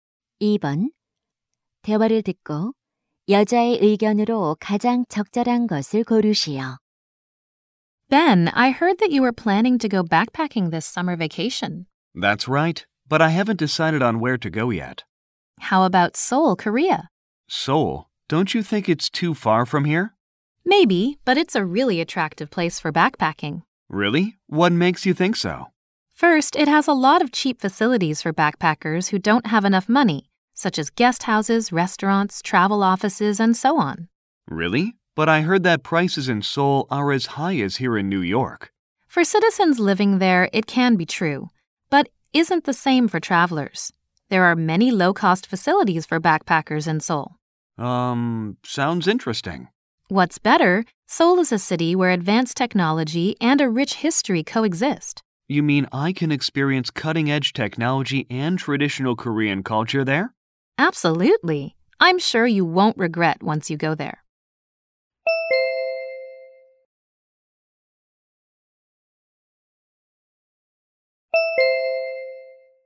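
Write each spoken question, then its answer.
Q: 대화를 듣고 여자의 의견으로 가장 적절한 것을 고르시오.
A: 서울은 배낭여행하기에 매력적인 곳이다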